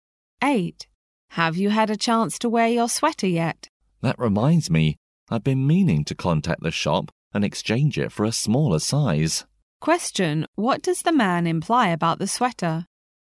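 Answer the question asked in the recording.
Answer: It is too big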